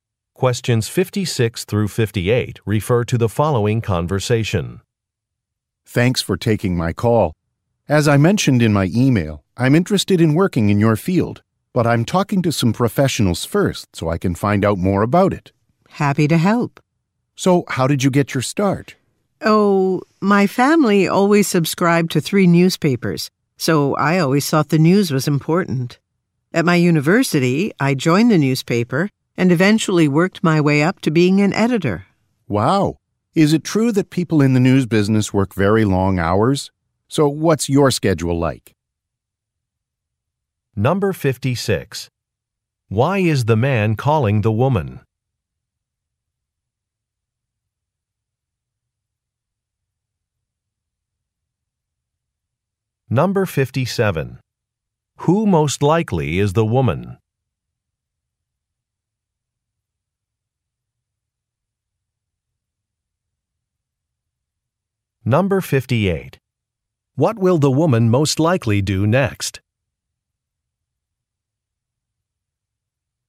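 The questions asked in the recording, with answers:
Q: Why is the man calling the woman?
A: To learn about her profession

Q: Who most likely is the woman?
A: A journalist

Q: What will the woman most likely do next?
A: Describe her work schedule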